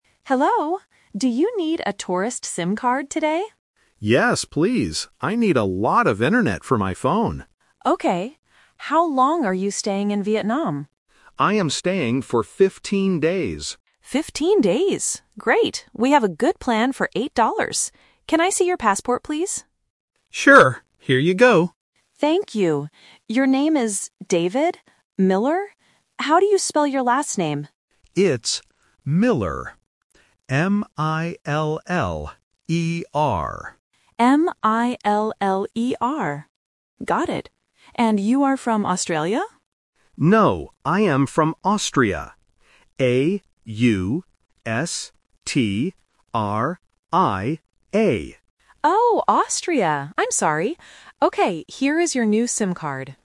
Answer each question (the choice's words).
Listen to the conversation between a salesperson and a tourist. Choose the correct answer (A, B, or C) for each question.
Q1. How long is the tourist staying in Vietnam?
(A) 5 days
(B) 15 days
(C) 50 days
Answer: 15 days

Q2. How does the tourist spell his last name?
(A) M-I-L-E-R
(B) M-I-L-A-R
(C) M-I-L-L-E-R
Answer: M-I-L-L-E-R

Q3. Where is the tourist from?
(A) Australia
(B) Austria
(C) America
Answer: Austria

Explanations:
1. The tourist clearly says, "I am staying for fifteen days." The salesperson also repeats "Fifteen days." Option (C) "50 days" is a trap because "fifteen" and "fifty" sound very similar. Option (A) is not mentioned.
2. The tourist spells his last name letter by letter as "M-I-L-L-E-R". Options (A) and (B) are missing the double 'L' or use the wrong vowel, which tests the listener's ability to hear English alphabet sounds correctly.
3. The salesperson asks if he is from "Australia" (which is the trap), but the tourist corrects her and says, "No, I am from Austria. A-U-S-T-R-I-A." Option (A) was mentioned but rejected. Option (C) was never mentioned.

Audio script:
Salesperson: Hello! Do you need a tourist SIM card today?
Tourist: Yes, please. I need a lot of internet for my phone.
Salesperson: Okay. How long are you staying in Vietnam?
Tourist: I am staying for fifteen days.
Great. We have a good plan for 8$. Can I see your passport, please?
Tourist: Sure. Here you go.
Salesperson: Thank you. Your name is David... How do you spell your last name?
Tourist: It's Miller. M-I-L-L-E-R.
Salesperson: M-I-L-L-E-R. Got it. And you are from Australia?
Tourist: No, I am from Austria. A-U-S-T-R-I-A.